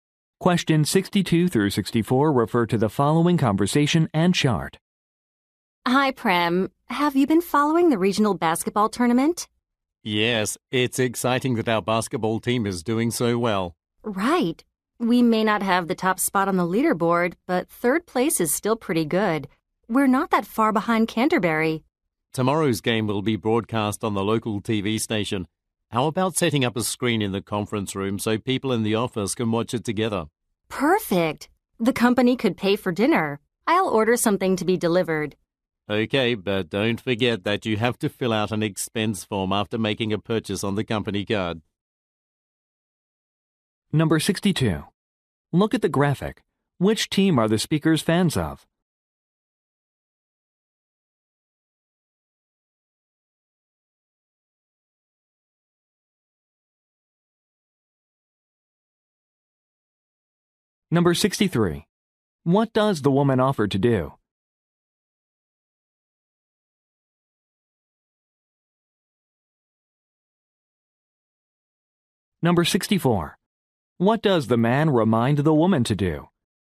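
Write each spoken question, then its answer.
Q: What does the woman offer to do?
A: Order dinner to be delivered

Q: What does the man remind the woman to do?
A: Fill out an expense form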